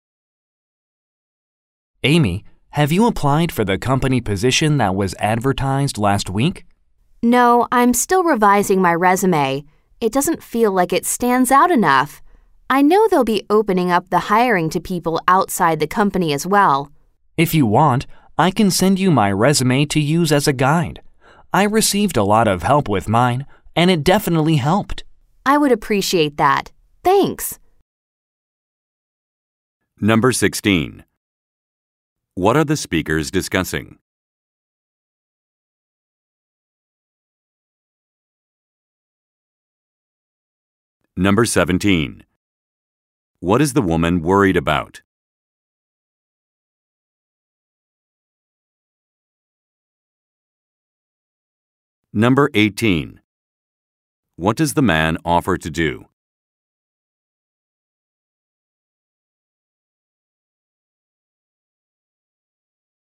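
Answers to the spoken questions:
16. Applying for a company job opening
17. Her resume doesn't stand out enough
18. Send her his resume to use as a guide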